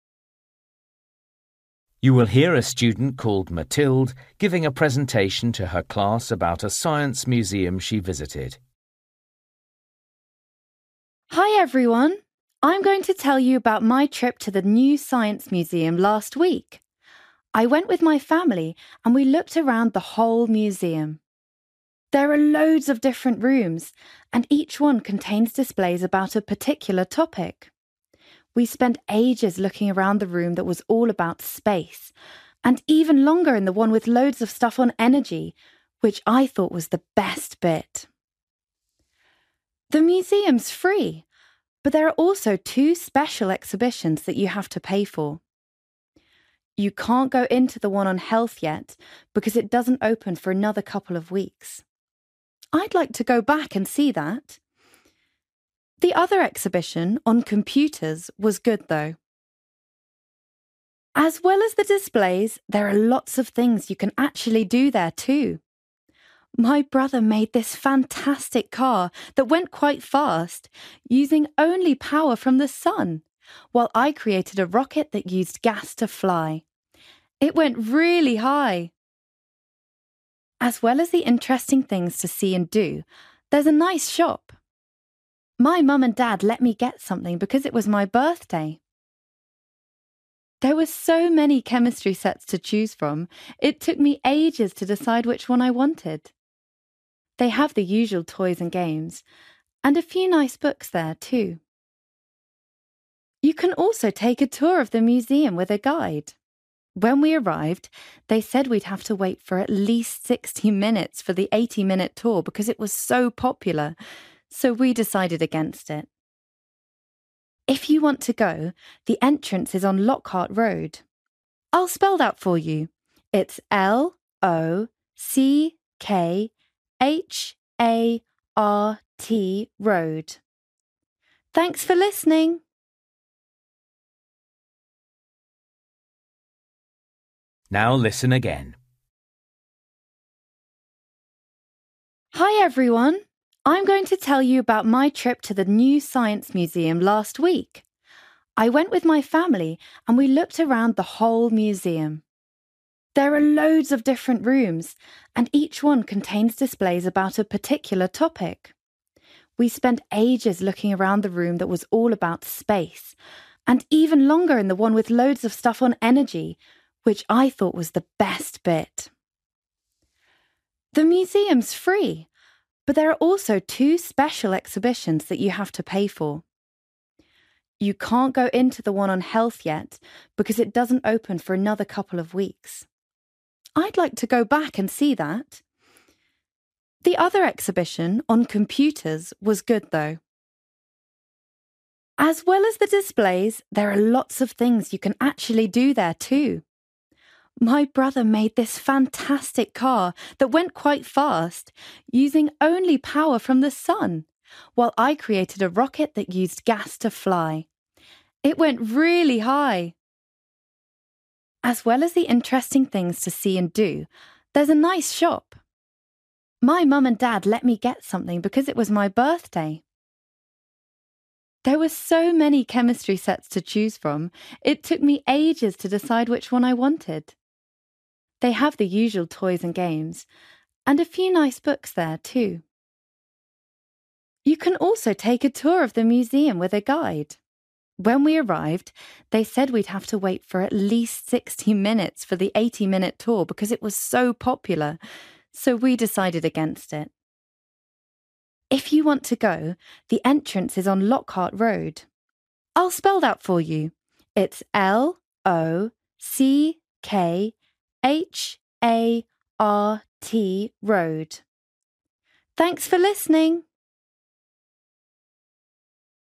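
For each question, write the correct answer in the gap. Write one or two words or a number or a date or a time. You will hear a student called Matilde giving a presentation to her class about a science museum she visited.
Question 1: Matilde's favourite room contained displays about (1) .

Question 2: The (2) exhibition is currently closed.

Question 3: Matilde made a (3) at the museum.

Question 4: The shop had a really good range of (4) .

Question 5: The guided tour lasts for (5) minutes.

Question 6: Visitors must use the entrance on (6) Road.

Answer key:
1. energy
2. health
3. rocket
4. chemistry sets
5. 80
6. Lockhart

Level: Luyện nghe trình độ B1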